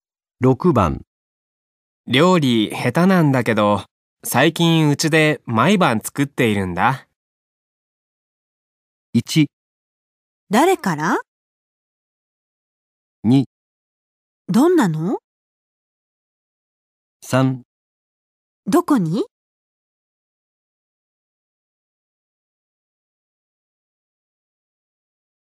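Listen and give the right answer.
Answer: 2: どんなの?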